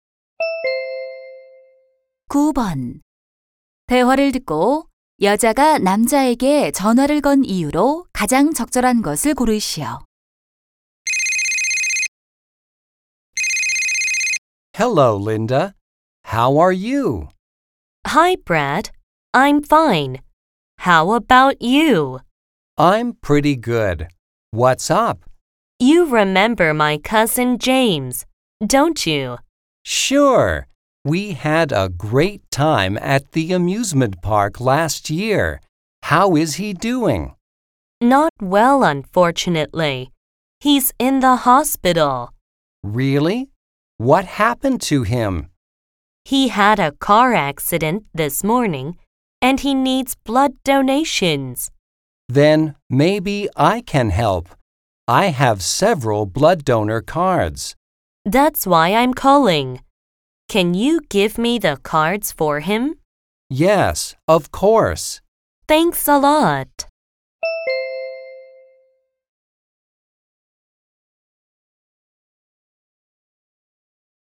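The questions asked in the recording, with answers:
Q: 대화를 듣고 여자가 남자에게 전화를 건 이유로 가장 적절한 것을 고르시오.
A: 헌혈증을 부탁하려고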